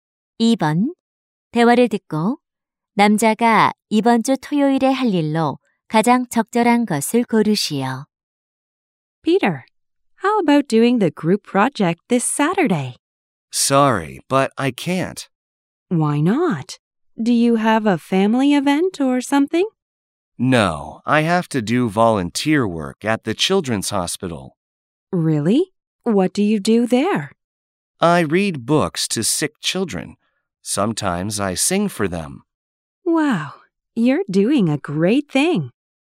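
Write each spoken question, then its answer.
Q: 대화를 듣고 남자가 이번 주 토요일에 할 일로 가장 적절한 것을 고르시오.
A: 어린이 병원에서 자원봉사하기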